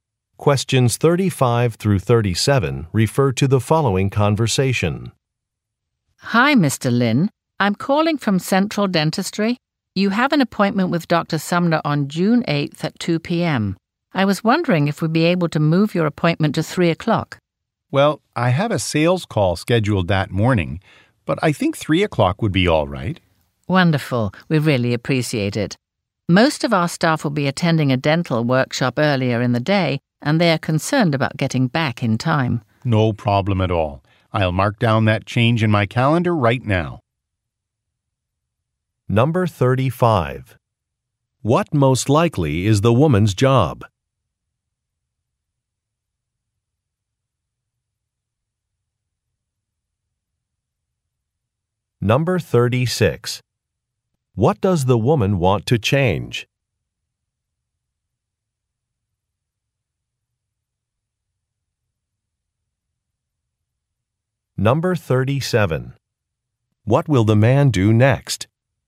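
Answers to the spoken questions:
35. Receptionist at a dental office
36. The time of an appointment
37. Update his calendar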